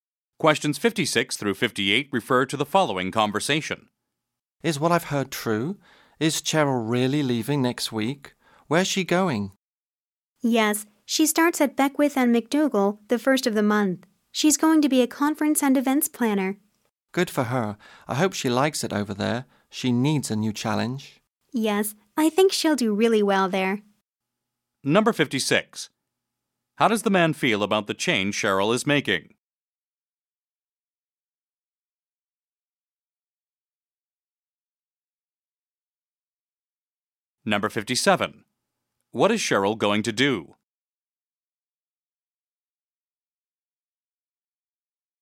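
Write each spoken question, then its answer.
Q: How does the man feel about the change Cheryl is making?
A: He is happy for her

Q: What is Cheryl going to do?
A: Work as a conference and events planner at Beckwith and McDougall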